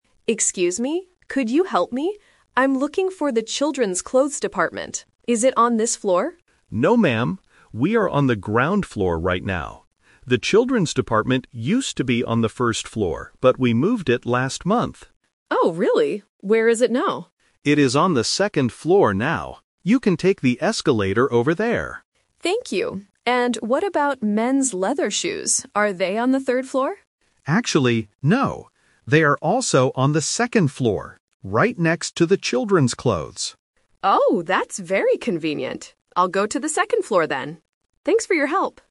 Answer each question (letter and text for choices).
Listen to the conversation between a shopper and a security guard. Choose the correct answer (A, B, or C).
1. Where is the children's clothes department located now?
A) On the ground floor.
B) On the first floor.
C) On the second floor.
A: C) On the second floor.

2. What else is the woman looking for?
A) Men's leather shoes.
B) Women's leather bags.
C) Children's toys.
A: A) Men's leather shoes.

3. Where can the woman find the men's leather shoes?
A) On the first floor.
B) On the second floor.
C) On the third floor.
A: B) On the second floor.

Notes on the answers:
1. This is "The Twist". The guard says the children's department used to be on the first floor (Option B - the trap), "but we moved it last month. It is on the second floor now." Option (A) is also a trap because it is where they are standing right now, not where the clothes are.
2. Mary asks, "And what about men's leather shoes?" Option (C) uses the word "children's", and Option (B) uses the word "leather", but these specific items are not what Mary wants to find.
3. Mary asks if the shoes are on the third floor (Option C - the trap). The guard corrects her: "Actually, no. They are also on the second floor..." Option (A) is not mentioned for the shoes.

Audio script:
Mary: Excuse me, could you help me? I'm looking for the children's clothes department. Is it on this floor?
Security Guard: No, ma'am. We are on the ground floor right now. The children's department used to be on the first floor, but we moved it last month.
Mary: Oh, really? Where is it now?
Security Guard: It is on the second floor now. You can take the escalator over there.
Mary: Thank you. And what about men's leather shoes? Are they on the third floor?
Security Guard: Actually, no. They are also on the second floor, right next to the children's clothes.